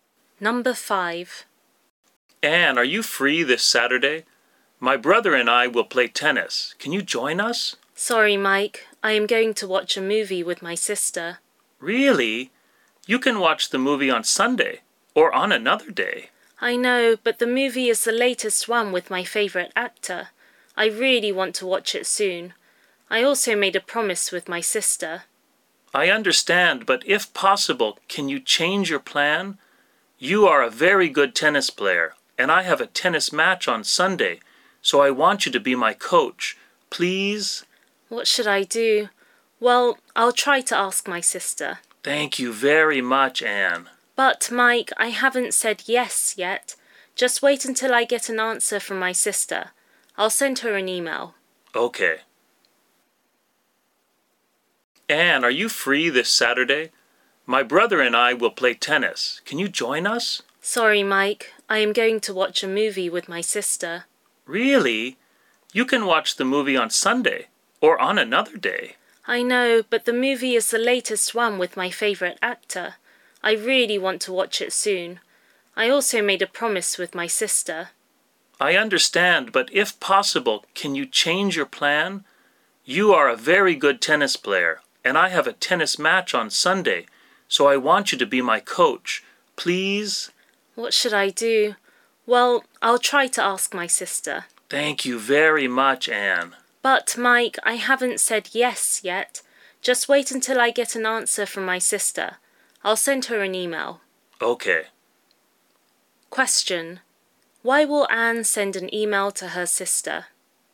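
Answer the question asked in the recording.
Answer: To ask if she can change their movie plan so she can play tennis with Mike on Saturday.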